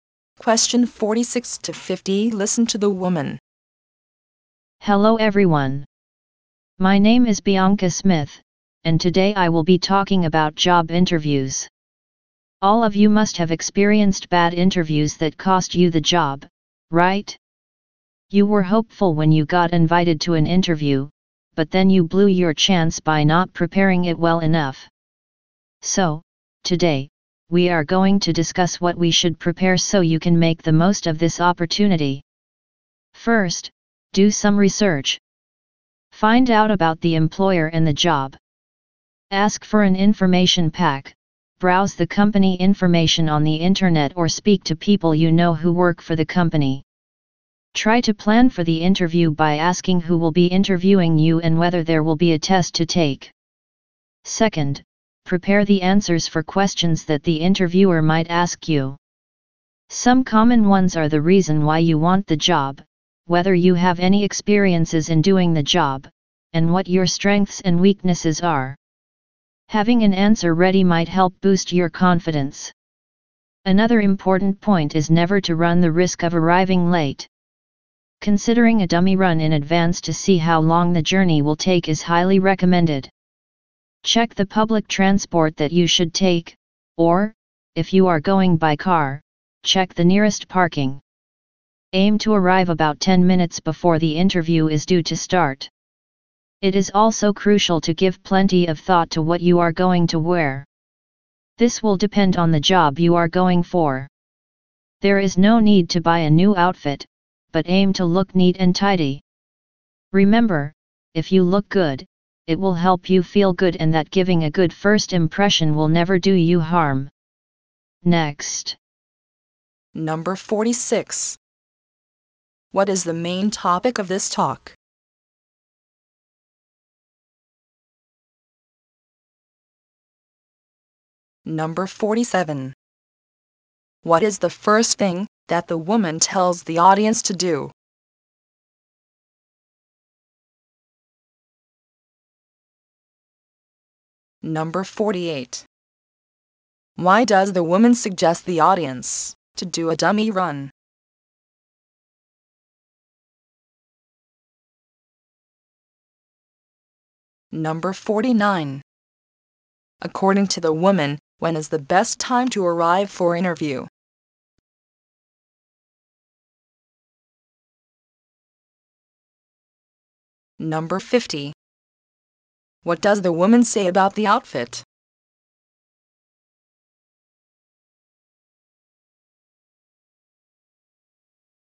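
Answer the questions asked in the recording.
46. Preparing for job interviews
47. Do some research on the employer and the job
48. To see how long the journey will take so they don't arrive late
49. About 10 minutes before the interview starts
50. No need to buy a new one; look neat and tidy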